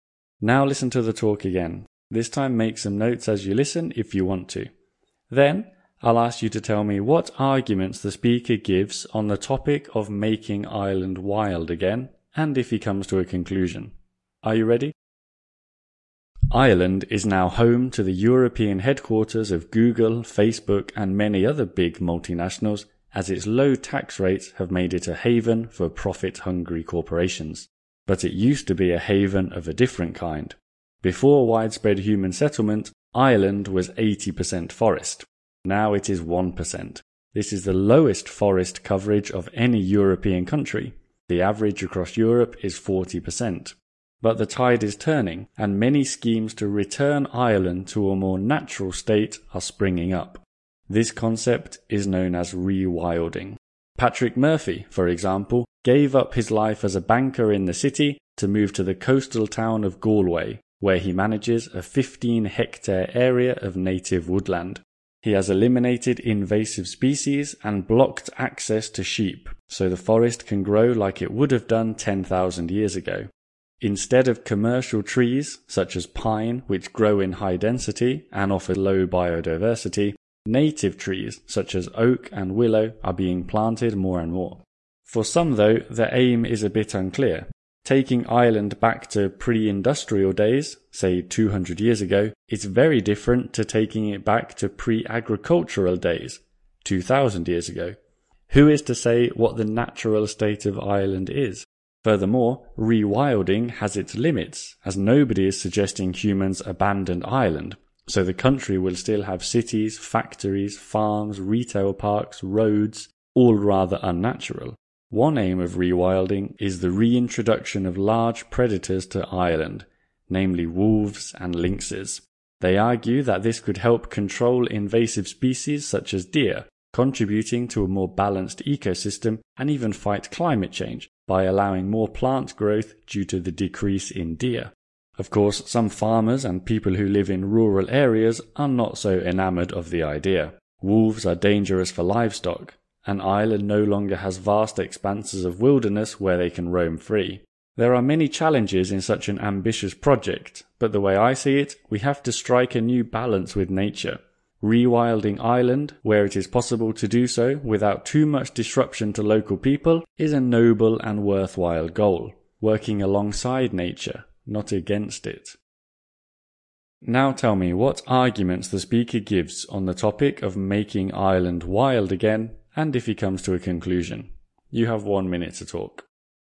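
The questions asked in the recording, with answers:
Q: Now tell me what arguments the speaker gives on the topic of making Ireland wild again, and if he comes to a conclusion.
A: For: Ireland has only 1% forest, native trees give more biodiversity, and wolves and lynxes could control deer and help fight climate change. Against: the aim is unclear, cities and farms will stay, and wolves are a danger to livestock. Conclusion: rewilding where it doesn't disrupt local people is a noble, worthwhile goal.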